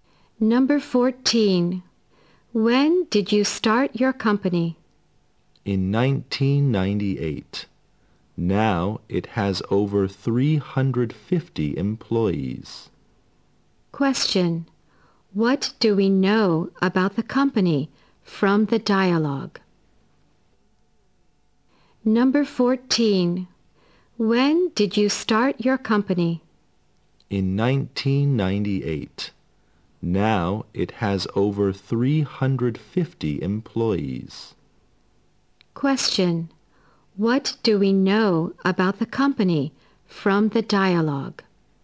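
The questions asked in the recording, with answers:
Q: What do we know about the company from the dialogue?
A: It was started in 1998 and now has over 350 employees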